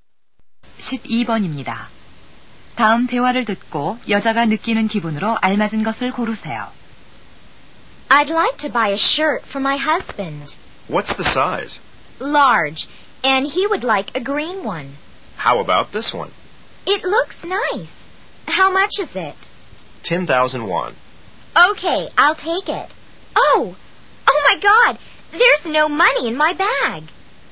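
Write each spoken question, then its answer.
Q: 다음 대화를 듣고 여자가 느끼는 기분으로 알맞은 것을 고르세요.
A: 당황함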